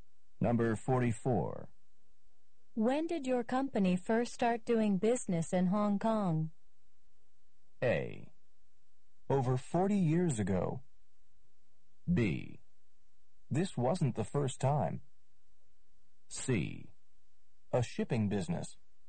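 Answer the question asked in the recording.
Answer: A: Over 40 years ago.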